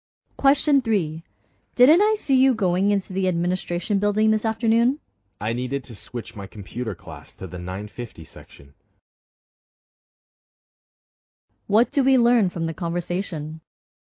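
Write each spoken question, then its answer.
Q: What do we learn from the conversation?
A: The woman went to switch her computer class to another section.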